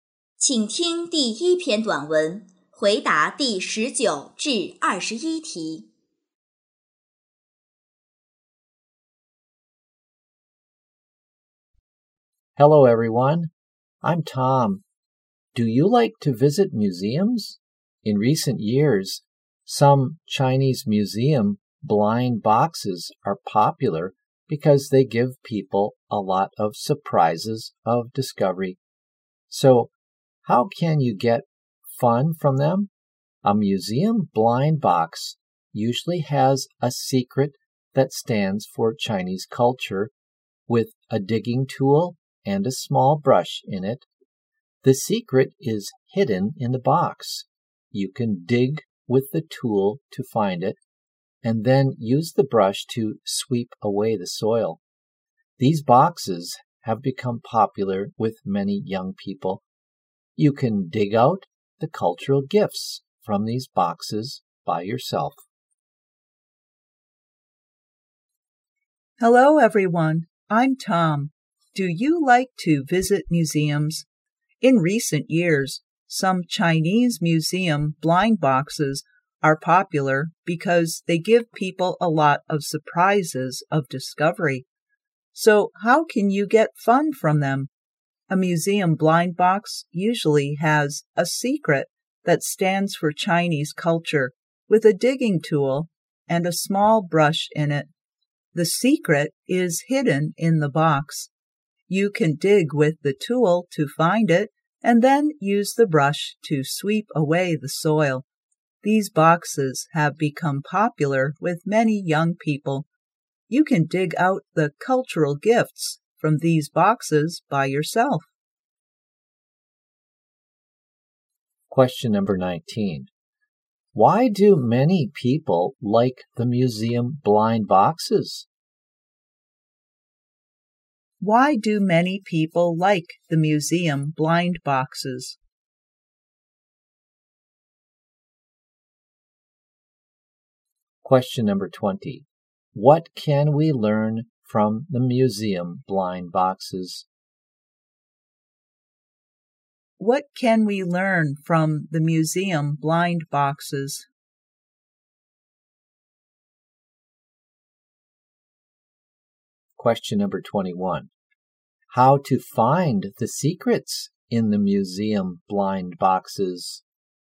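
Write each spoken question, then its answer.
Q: Why do many people like the museum blind boxes?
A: They give people a lot of surprises of discovery

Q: What can we learn from the museum blind boxes?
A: Chinese culture

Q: How to find the secrets in the museum blind boxes?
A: Dig with the tool and sweep away the soil with the brush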